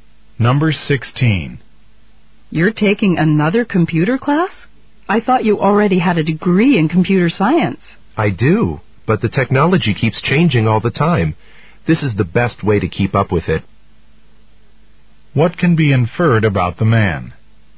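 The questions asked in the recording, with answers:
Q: What can be inferred about the man?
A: He wants to keep up with changing technology.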